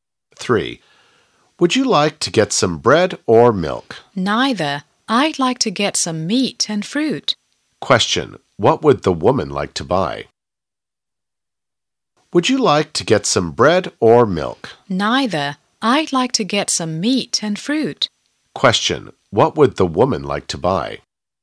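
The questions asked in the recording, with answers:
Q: What would the woman like to buy?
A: Some meat and fruit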